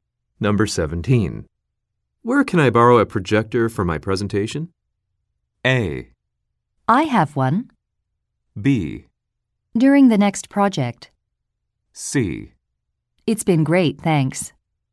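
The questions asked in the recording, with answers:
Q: Where can I borrow a projector for my presentation?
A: A: I have one.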